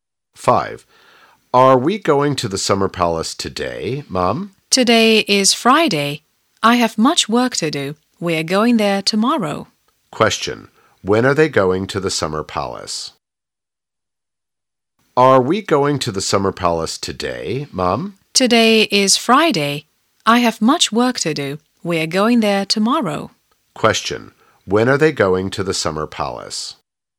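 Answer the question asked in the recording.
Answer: Tomorrow (Saturday).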